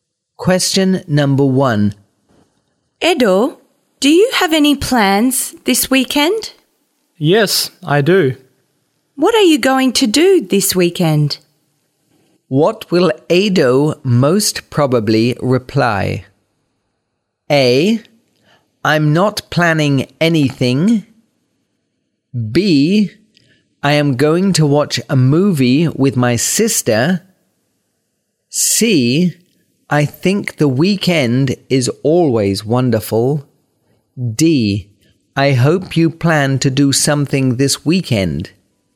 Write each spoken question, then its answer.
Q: What will Edo most probably reply?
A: B. I am going to watch a movie with my sister.